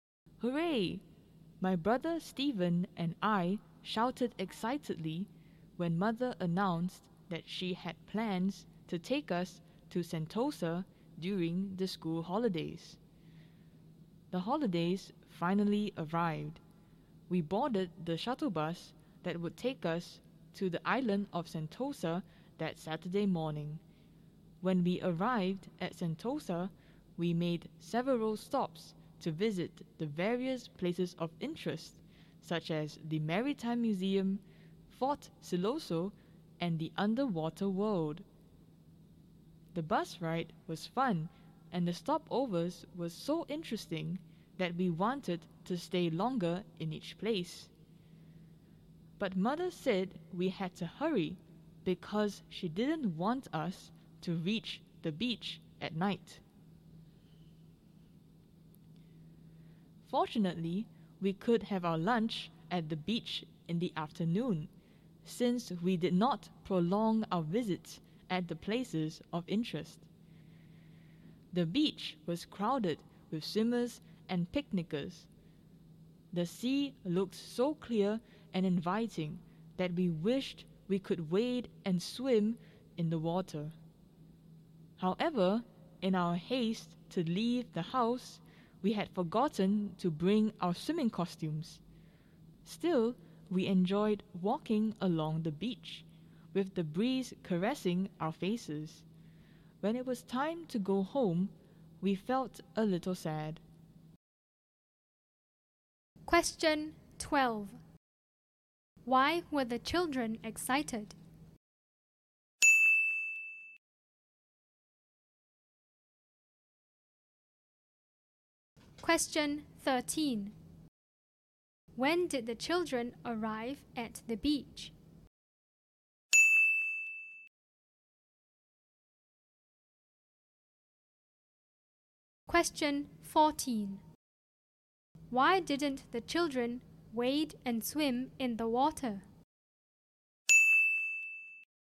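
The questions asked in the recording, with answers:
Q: Why were the children excited?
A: Mother planned to take them to Sentosa during the school holidays

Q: When did the children arrive at the beach?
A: In the afternoon

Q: Why didn't the children wade and swim in the water?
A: They had forgotten to bring their swimming costumes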